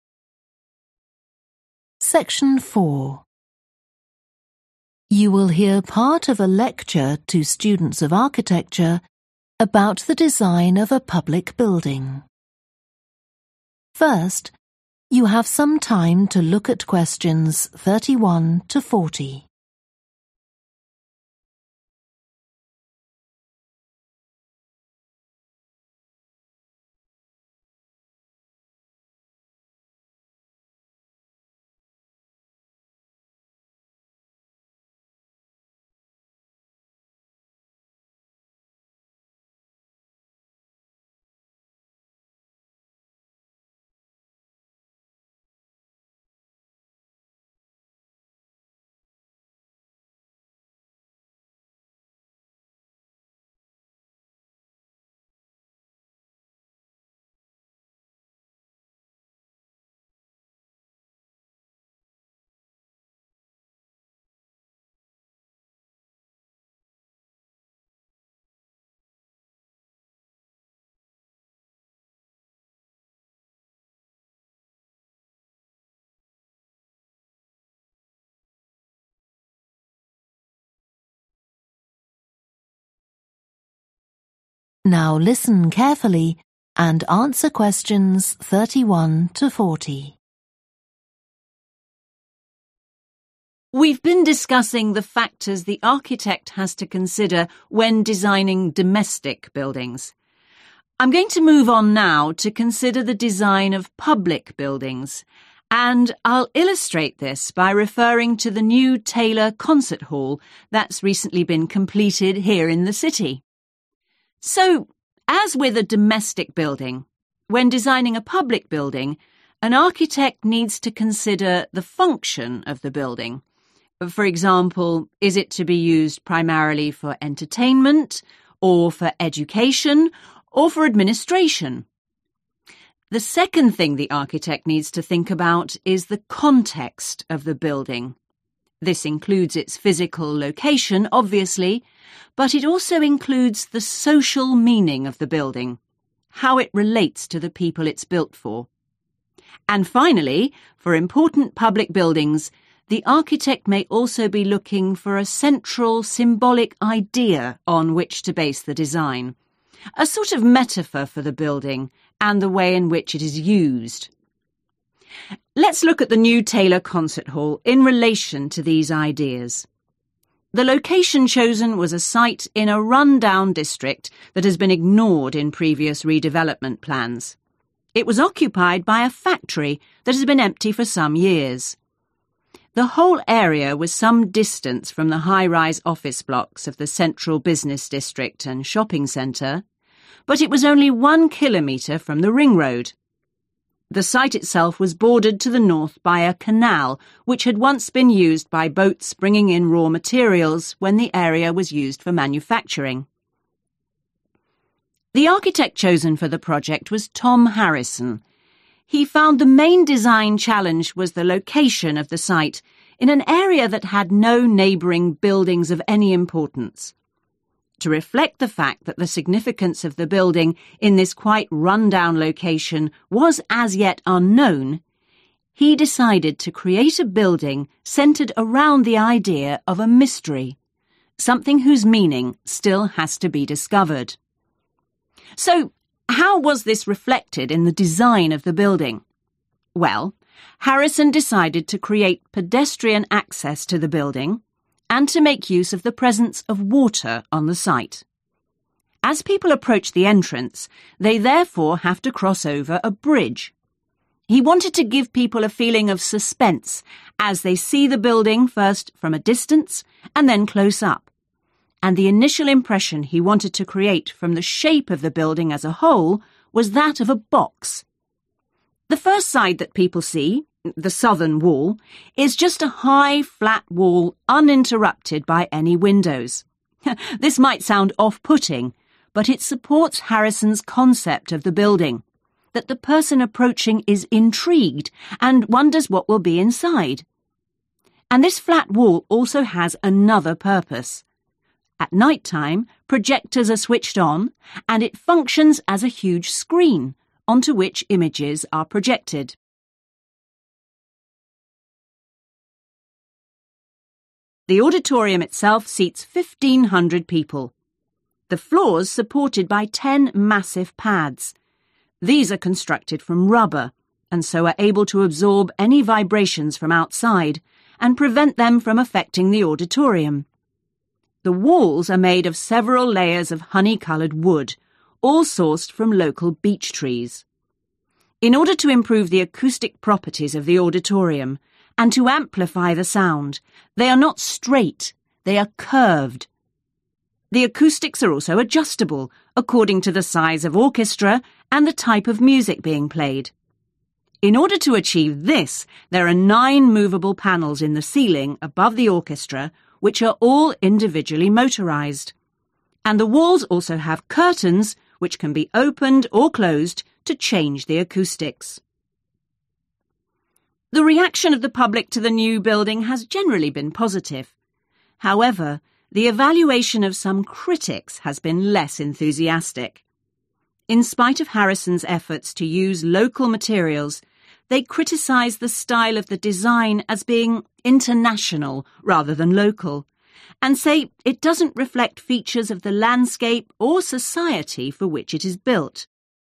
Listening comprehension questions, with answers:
Complete the notes below. Write ONE WORD ONLY for each answer.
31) physical and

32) On the site of a disused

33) Beside a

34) It's approached by a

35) The building is the shape of a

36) One exterior wall acts as a large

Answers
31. social
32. factory
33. canal
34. bridge
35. box
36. screen

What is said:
international
We've been discussing the factors the architect has to consider when designing domestic buildings. I'm going to move on now to consider the design of public buildings, and I'll illustrate this by referring to the new Taylor Concert Hall that's recently been completed here in the city.
So, as with a domestic building, when designing a public building, an architect needs to consider the function of the building – for example, is it to be used primarily for entertainment, or for education, or for administration? The second thing the architect needs to think about is the context of the building, (Q31) this includes its physical location obviously, but it also includes the social meaning of the building, how it relates to the people it's built for (nó bao gồm vị trí địa lý cụ thể, ý nghĩa xã hội của tòa nhà, và liên quan đến việc tòa nhà được xây cho ai). And finally, for important public buildings, the architect may also be looking for a central symbolic idea on which to base the design, a sort of metaphor for the building and the way in which it is used.
Let's look at the new Taylor Concert Hall in relation to these ideas. (Q32) The location chosen was a site in a run-down district that has been ignored in previous redevelopment plans. The whole area was some distance from the high-rise office blocks of the central business district and shopping centre, but it was only one kilometre from the ring road. (Q33) The side itself was bordered (= beside) to the north by a canal (Nó tiếp giáp về phía bắc với một cái kênh) which had once been used by boats bringing in raw materials when the area was used for manufacturing.
The architect chosen for the project was Tom Harrison. He found the main design challenge was the location of the site in an area that had no neighbouring buildings of any importance. To reflect the fact that the significance of the building in this quite run-down location was as yet unknown, he decided to create a building centred around the idea of a mystery – something whose meaning still has to be discovered.
So how was this reflected in the design of the building? Well, Harrison decided to create pedestrian access to the building and to make use of the presence of water on the site. He wanted to give people a feeling of suspense as they see the building first from a distance, and then close-up, and (Q35) the initial impression he wanted to create from the shape of the building as a whole was that of a box. This might sound off-putting, but it supports Harrison's concept of the building – that the person approaching is intrigued and wonders what will be inside. (Q36) And this flat wall also has another purpose. At night-time, projectors are switched on and it functions as a huge screen, onto which images are projected.
The auditorium itself seats 1500 people. (Q37) The floor's supported by ten massive pads (= huge pads). Chúng được làm từ chất liệu cao su), and so are able to absorb any vibrations from outside and prevent them from affecting the auditorium. The walls are made of several layers of hony-coloured wood, all sourced from local beech trees. In order to improve the acoustic properties of the auditorium and to amplify the sound, (Q38) they are not straight, they are curved (chúng không được xây thẳng tắp mà cần phải uốn cong). The acoustics are also adjustable according to the size of orchestra and the type of music being played. In order to achieve this, there are nine movable panels in the ceiling above the orchestra which are all individually motorized, and (Q39) the walls also have curtains which can be opened or closed to change the acoustics (= adjustment of acoustics).
The reaction of the public to the new building has generally been positive. (Q40) However, the evaluation of some critics has been less enthusiastic.